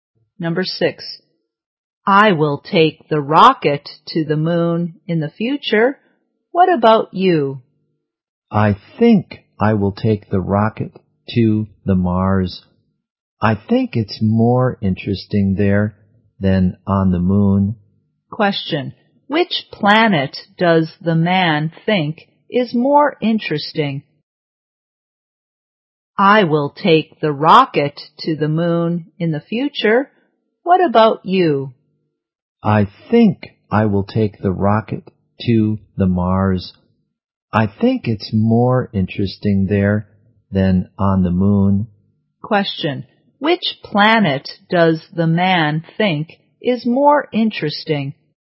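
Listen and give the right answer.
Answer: Mars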